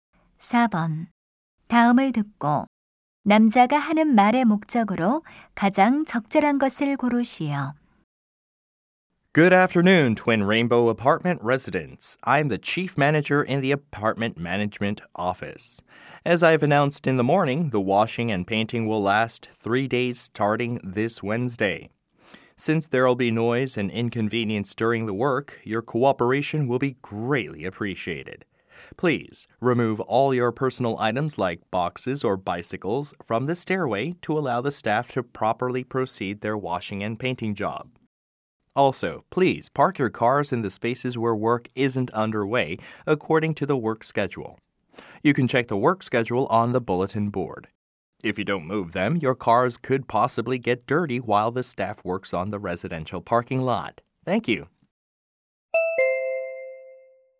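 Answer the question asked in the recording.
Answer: 아파트 세척 및 도색 작업에 대한 협조 요청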